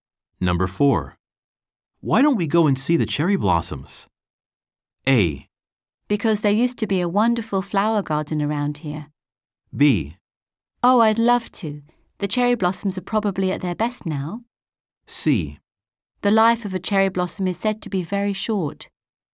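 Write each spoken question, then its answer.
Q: Why don't we go and see the cherry blossoms?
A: B: Oh, I'd love to. The cherry blossoms are probably at their best now.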